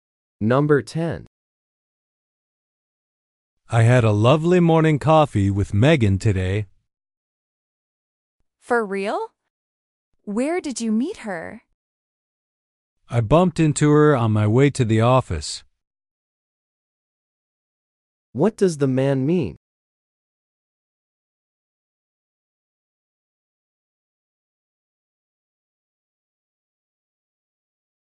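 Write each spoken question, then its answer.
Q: What does the man mean?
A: He met Megan by chance on his way to the office.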